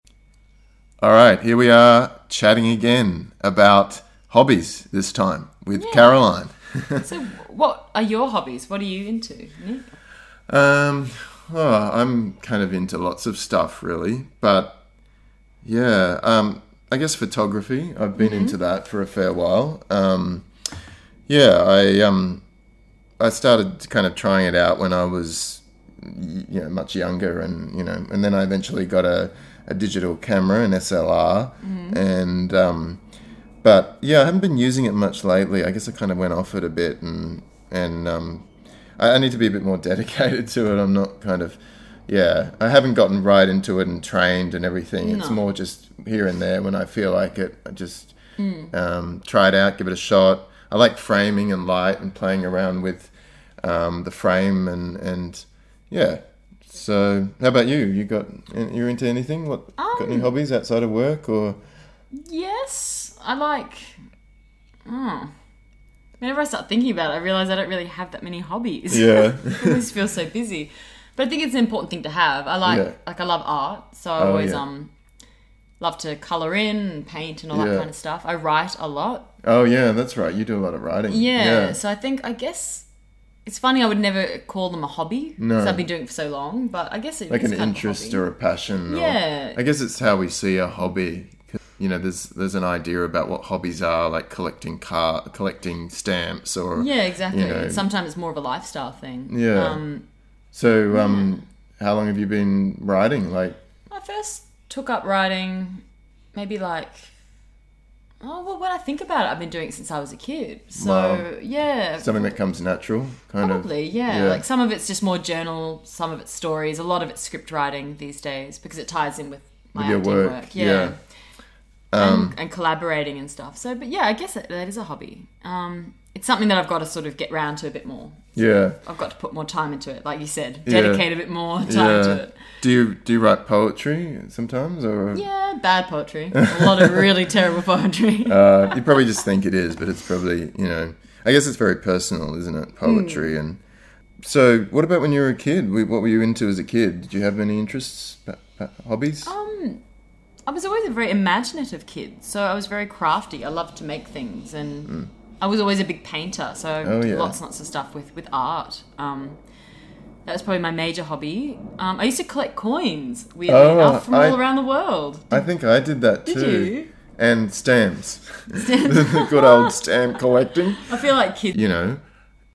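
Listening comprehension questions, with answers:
Try to answer the questions below.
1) Has Nick been taking photos lately?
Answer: No, he hasn't been using his camera much lately.

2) What does Nick like about photography?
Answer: Framing and light, playing around with the frame.

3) What kind of hobbies does Caroline have?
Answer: Art (colouring in, painting) and writing (journal, stories, scripts, poetry).

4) What hobbies did Caroline have as a kid?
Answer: Crafts, painting and art, and collecting coins from around the world.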